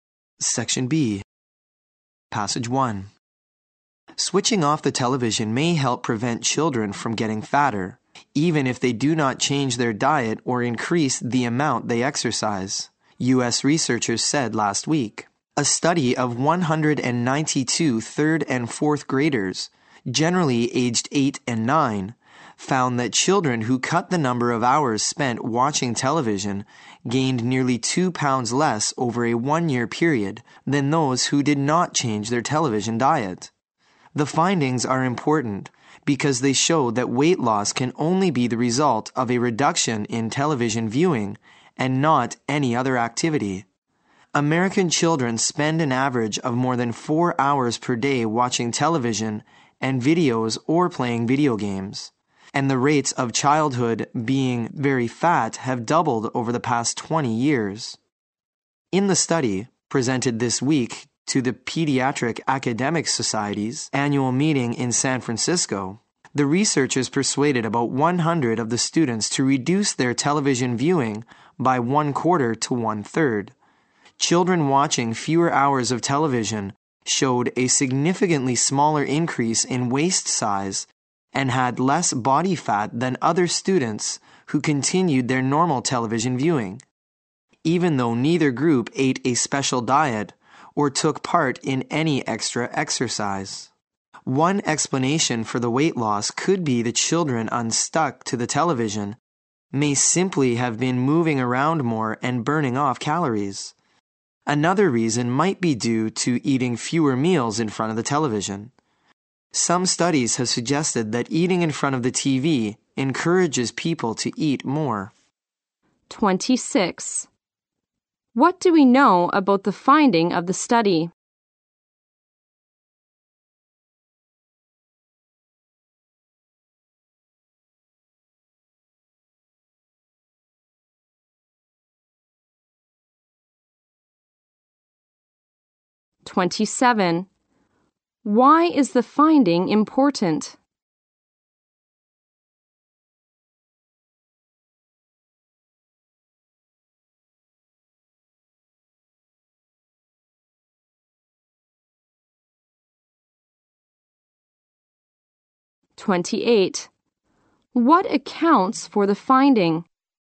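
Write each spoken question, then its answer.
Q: What do we know about the finding of the study?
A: Children who watched less TV gained less weight

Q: Why is the finding important?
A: It shows the weight difference resulted only from watching less TV

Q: What accounts for the finding?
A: Children moved around more and ate fewer meals in front of the TV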